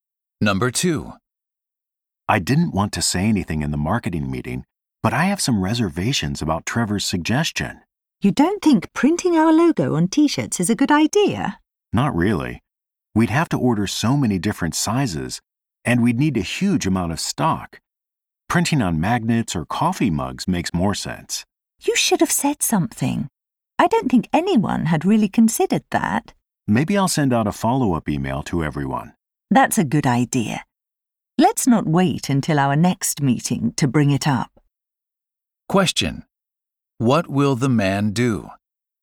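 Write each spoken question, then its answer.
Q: What will the man do?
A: Send a follow-up email about his concerns with the T-shirt idea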